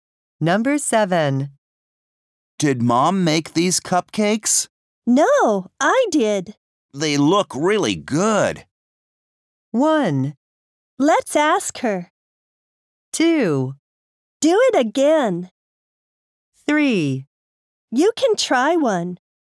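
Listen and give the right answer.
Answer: 3: You can try one.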